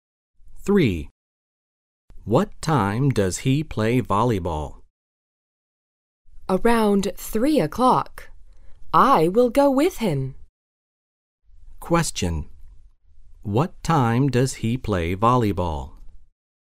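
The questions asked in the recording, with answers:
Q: What time does he play volleyball?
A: Around 3 o'clock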